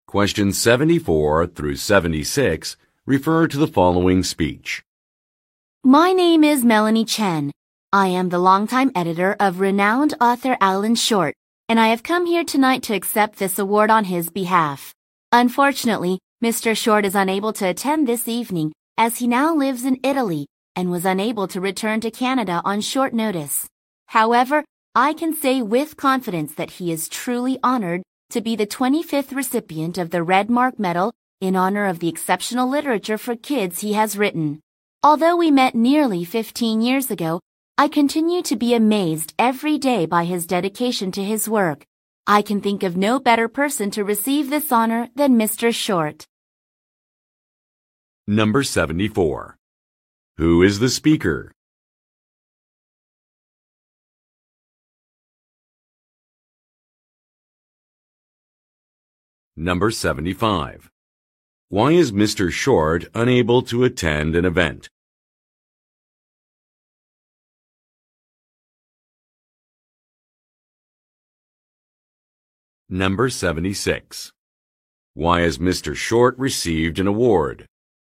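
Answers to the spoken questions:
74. Alan Short's longtime editor
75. He lives in Italy and couldn't return to Canada on short notice
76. For the exceptional children's literature he has written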